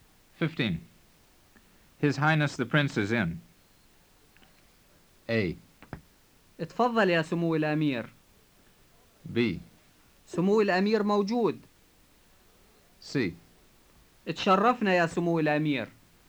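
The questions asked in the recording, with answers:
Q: His Highness the Prince is in.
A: B: سمو الأمير موجود.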